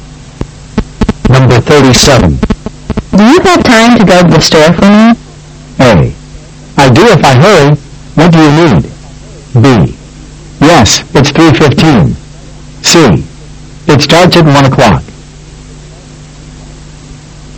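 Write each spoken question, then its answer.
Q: Do you have time to go to the store for me?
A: A: I do if I hurry. What do you need?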